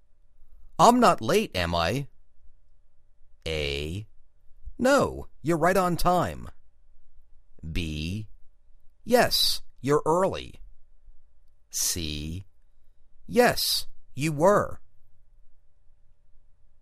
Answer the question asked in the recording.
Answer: No, you're right on time